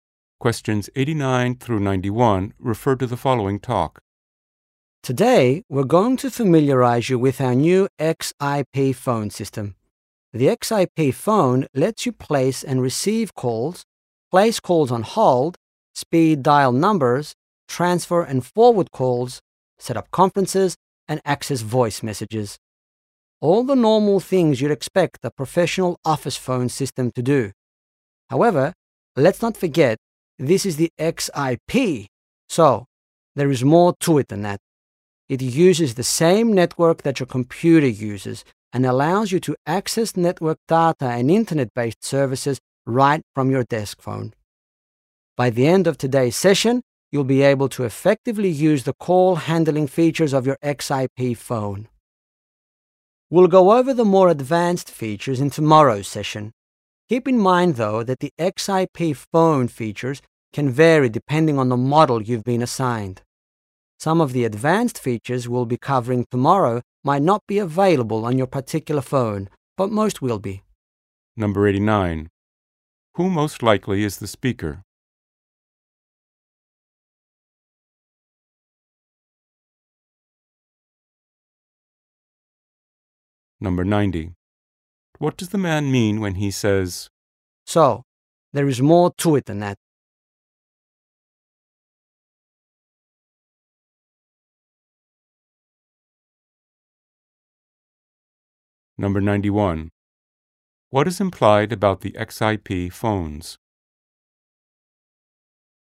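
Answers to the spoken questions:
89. A trainer
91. Their features vary by model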